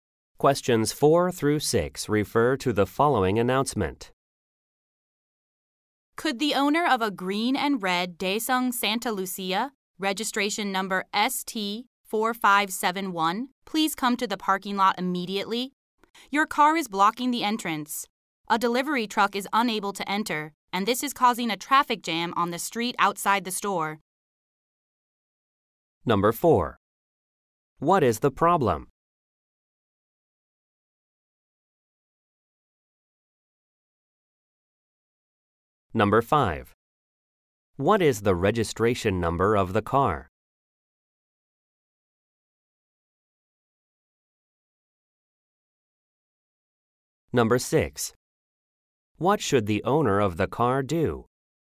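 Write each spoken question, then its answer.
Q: What is the problem?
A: A car is blocking the entrance

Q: What is the registration number of the car?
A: ST4571

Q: What should the owner of the car do?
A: Come to the parking lot immediately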